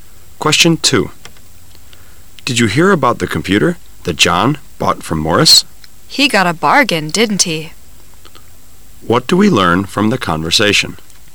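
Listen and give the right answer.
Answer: John bought the computer from Morris cheaply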